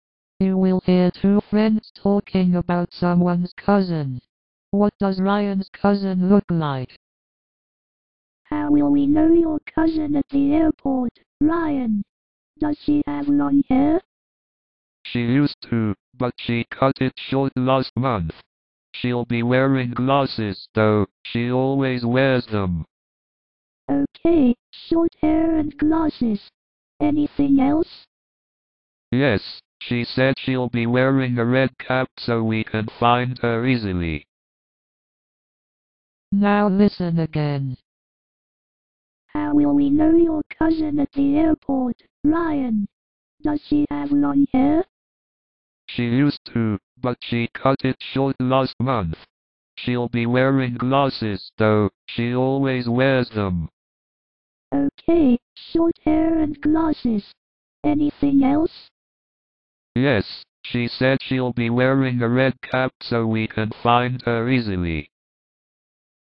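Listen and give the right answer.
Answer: She has short hair, wears glasses and will wear a red cap

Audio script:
You will hear two friends talking about someone's cousin.
WomanHow will we know your cousin at the airport, Ryan? Does she have long hair?
ManShe used to, but she cut it short last month. She'll be wearing glasses, though — she always wears them.
WomanOK, short hair and glasses. Anything else?
ManYes, she said she'll be wearing a red cap so we can find her easily.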